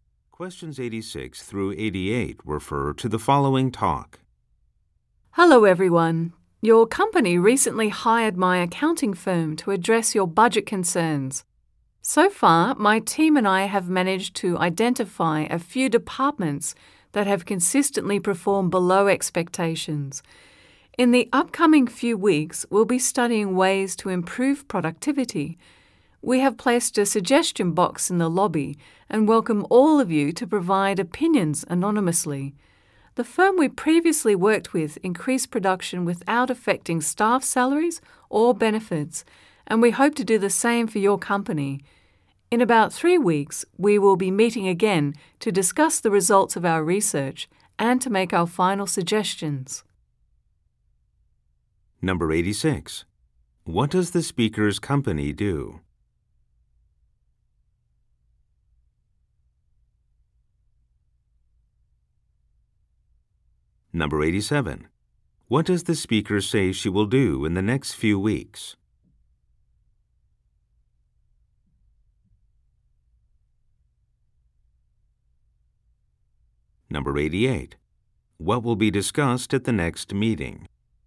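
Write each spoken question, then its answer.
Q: What does the speaker's company do?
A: Accounting

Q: What does the speaker say she will do in the next few weeks?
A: Study ways to improve productivity

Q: What will be discussed at the next meeting?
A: The research results and final suggestions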